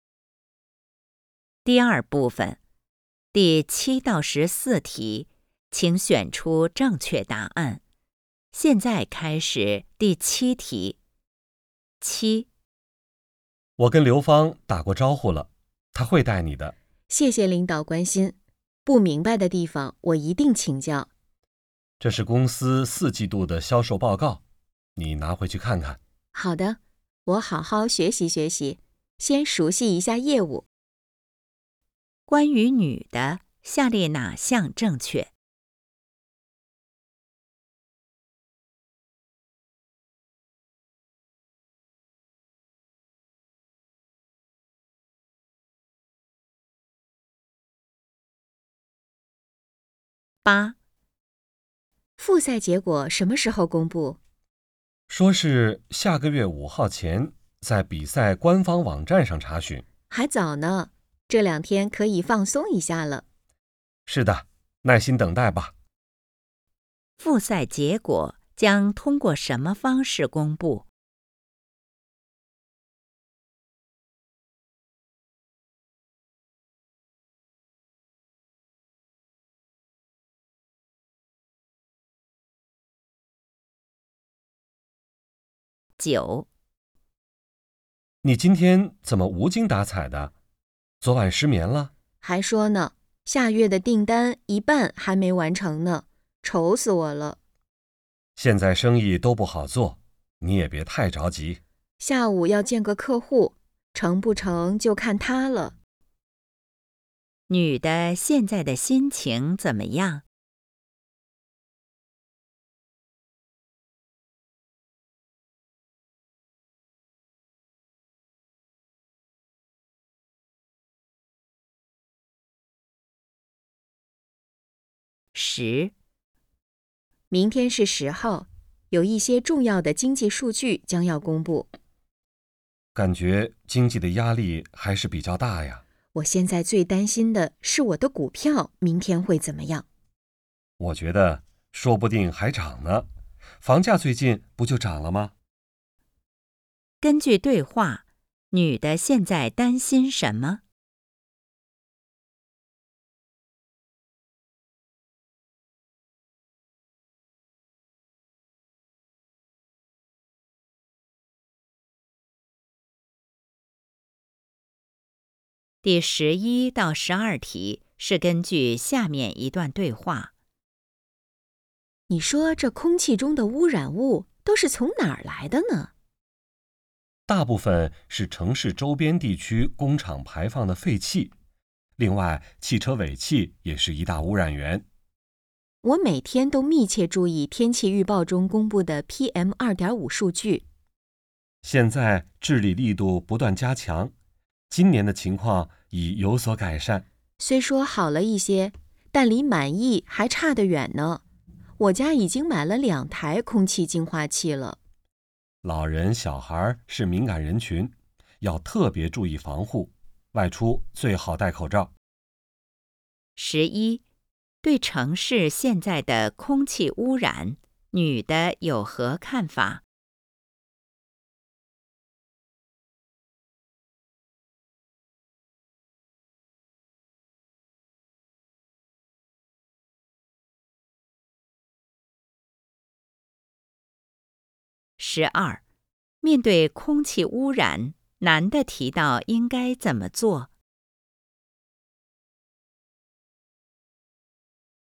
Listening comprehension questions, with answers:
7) 关于女的, 下列哪项正确?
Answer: 接手了新工作

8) 复赛结果将通过什么方式公布?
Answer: 比赛官网

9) 女的现在的心情怎么样?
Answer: 紧张不安

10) 根据对话, 女的现在担心什么?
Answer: 股票

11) 对城市现在的空气污染, 女的有何看法?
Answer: 治理效果还不满意

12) 面对空气污染, 男的提到应该怎么做?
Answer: 外出戴口罩

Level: HSK 5